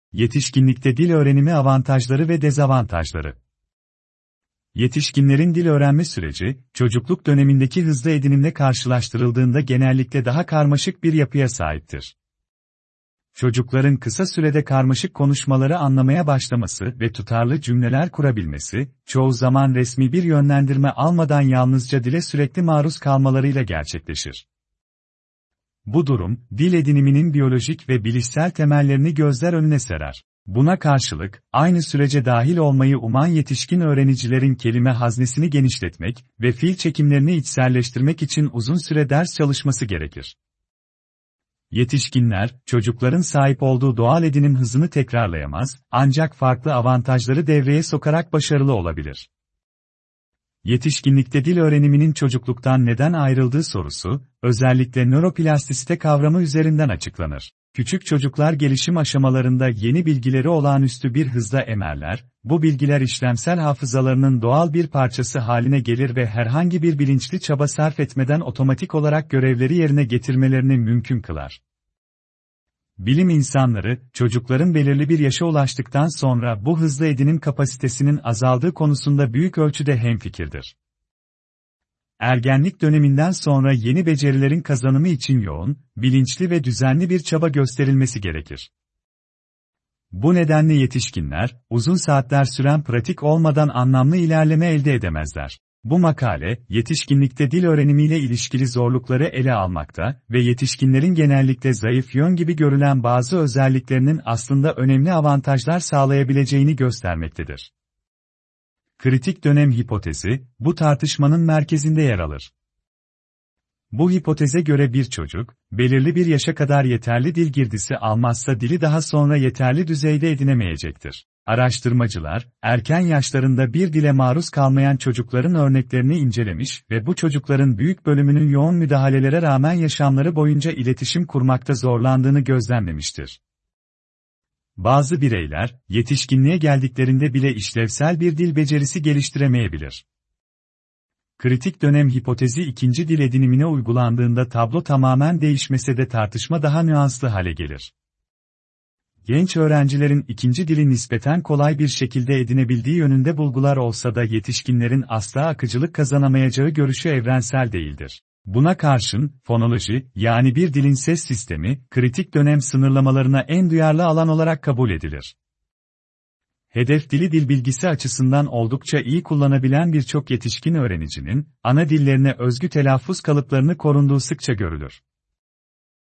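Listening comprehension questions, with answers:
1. Metne göre çocukların dili hızla edinmesinin temel nedeni nedir?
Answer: Dile sürekli ve doğal biçimde maruz kalmaları

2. Metinde yetişkinlerin dil öğrenirken daha fazla zorlanmasının nedeni aşağıdakilerden hangisidir?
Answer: İşlemsel hafızanın çocuklarda olduğu kadar etkili olmaması

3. Metne göre kritik dönem hipotezinin temel savı aşağıdakilerden hangisidir?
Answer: Dil girdisi belirli bir yaşa kadar alınmazsa tam yeterlilik gelişmeyebilir.

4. Araştırmacıların kritik dönemle ilgili bulgularına göre, erken yaşlarında dile maruz kalmayan çocuklar için hangi sonuç daha olasıdır?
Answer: Yoğun eğitime rağmen yaşam boyu iletişimde zorlanmaları

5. Metne göre yetişkinlerin fonoloji alanında zorlanmasının en önemli nedeni nedir?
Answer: Ses sisteminin kritik dönem sınırlamalarına daha duyarlı olması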